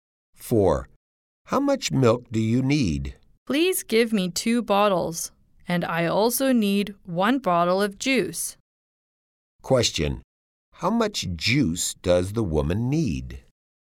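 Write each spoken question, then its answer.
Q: How much juice does the woman need?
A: One bottle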